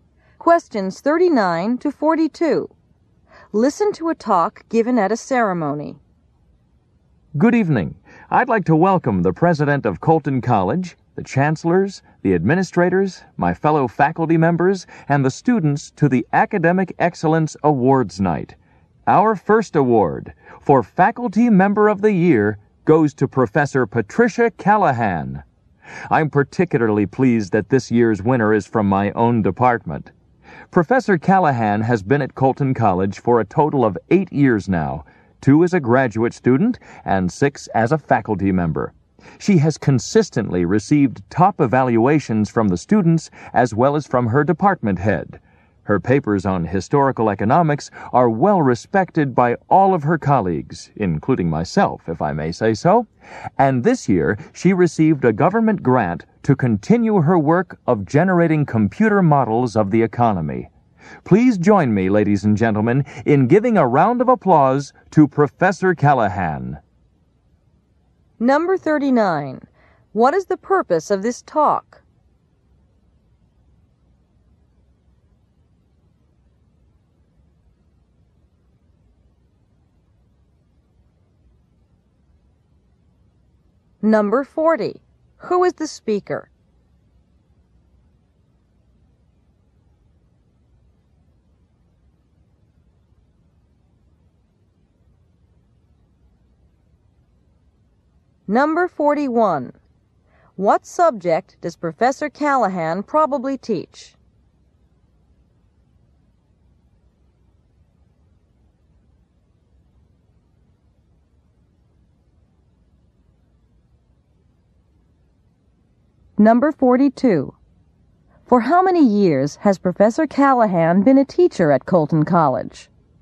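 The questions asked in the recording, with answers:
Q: What is the purpose of this talk?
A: To present an award to Professor Callahan

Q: Who is the speaker?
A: A faculty member in Professor Callahan's department

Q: What subject does Professor Callahan probably teach?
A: Economics

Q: For how many years has Professor Callahan been a teacher at Colton College?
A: 6 years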